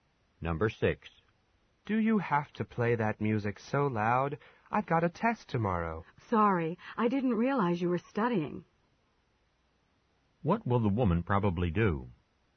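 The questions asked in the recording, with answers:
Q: What will the woman probably do?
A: Turn the music down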